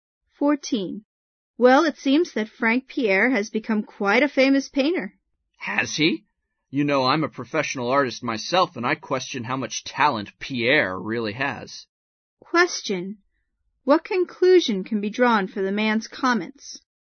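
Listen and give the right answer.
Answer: He doubts that Pierre is really talented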